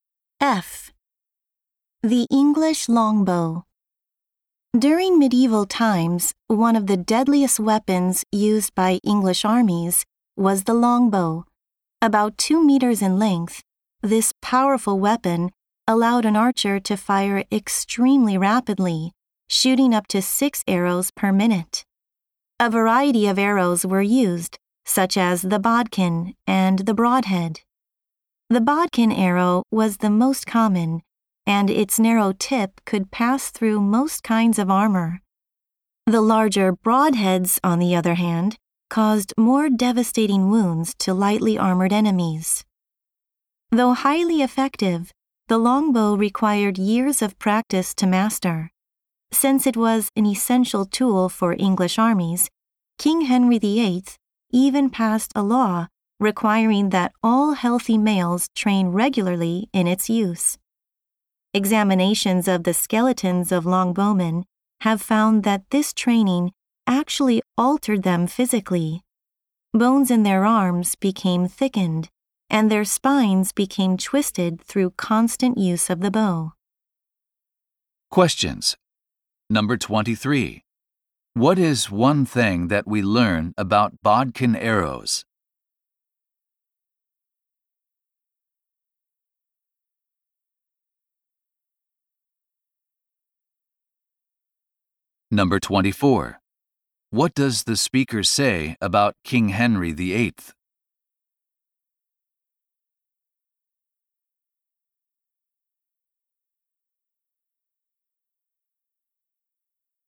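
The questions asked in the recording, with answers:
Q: What is one thing that we learn about bodkin arrows?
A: They were the most common, and their narrow tips could pass through most armor.

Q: What does the speaker say about King Henry VIII?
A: He passed a law requiring all healthy males to train regularly with the longbow.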